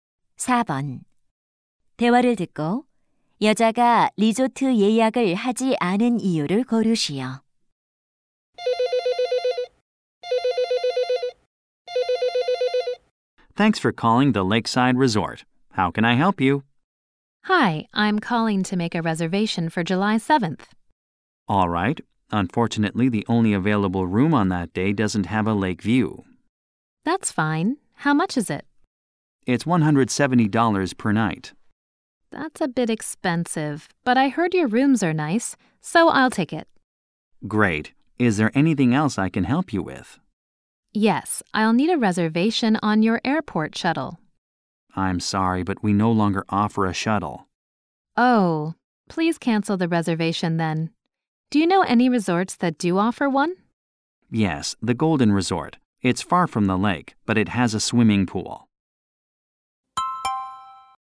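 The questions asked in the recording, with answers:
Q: 대화를 듣고 여자가 리조트 예약을 하지 않은 이유를 고르시오.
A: 공항 셔틀 서비스를 더 이상 제공하지 않아서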